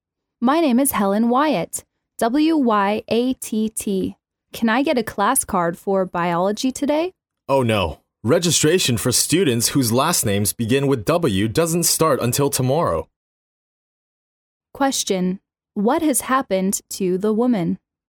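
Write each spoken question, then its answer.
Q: What has happened to the woman?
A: She can't get a class card today; registration for last names beginning with W starts tomorrow.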